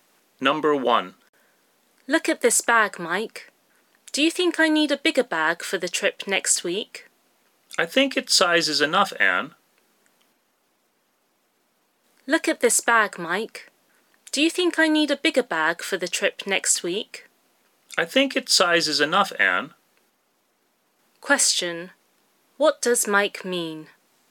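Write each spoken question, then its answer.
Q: What does Mike mean?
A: Anne doesn't need a bigger bag; her bag is big enough.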